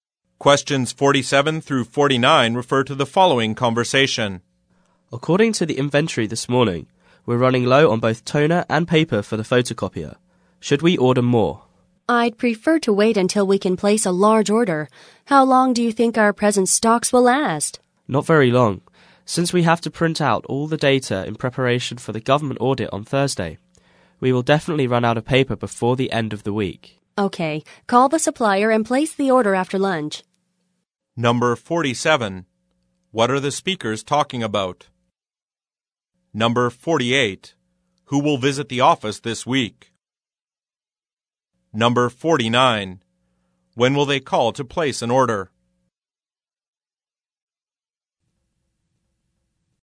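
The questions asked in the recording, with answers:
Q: What are the speakers talking about?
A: Ordering office supplies (toner and paper)

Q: Who will visit the office this week?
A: Government auditors

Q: When will they call to place an order?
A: After lunch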